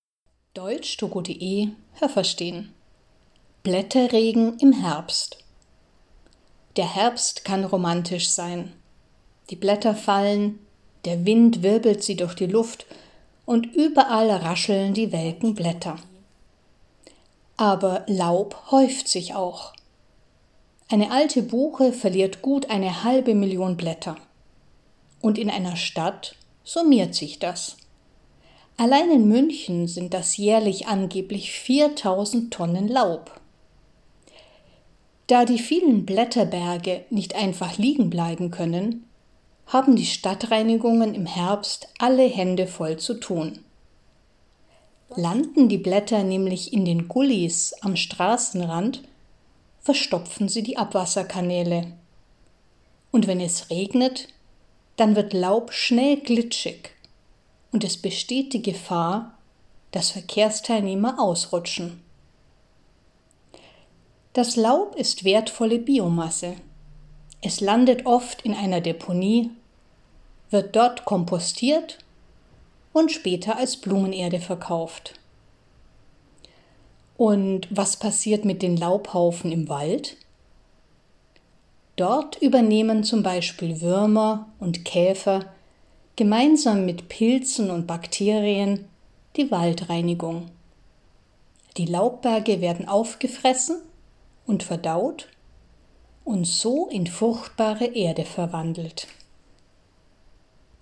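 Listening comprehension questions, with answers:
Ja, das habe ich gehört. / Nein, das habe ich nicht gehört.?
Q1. Die trockenen Blätter im Herbst machen ein besonderes Geräusch. Haben Sie das gehört? Stimmt diese Aussage?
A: Ja, das habe ich gehört.

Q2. Allein in München verlieren die Bäume eine halbe Million Blätter. Haben Sie das gehört? Stimmt diese Aussage?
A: Nein, das habe ich nicht gehört.

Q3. In Städten muss man die Laubhaufen entfernen. Haben Sie das gehört? Stimmt diese Aussage?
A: Ja, das habe ich gehört.

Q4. Die Stadtreinigung muss das Laub mit den Händen beseitigen, damit es die Abwasserkanäle nicht verstopft. Haben Sie das gehört? Stimmt diese Aussage?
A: Nein, das habe ich nicht gehört.

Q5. Nasses Laub kann gefährlich werden. Haben Sie das gehört? Stimmt diese Aussage?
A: Ja, das habe ich gehört.

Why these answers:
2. Eine einzige alte Buche (= ein Laubbaum) verliert bereits eine halbe Million Blätter. 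In München sind das insgesamt angeblich 4.000 Tonnen Laub.
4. Sie machen das nicht mit den Händen. „Alle Hände voll zu tun haben" ist ein fester Ausdruck und bedeutet ‚sehr viel Arbeit haben'.
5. Es wird dann glitschig und man kann leicht ausrutschen.

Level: B2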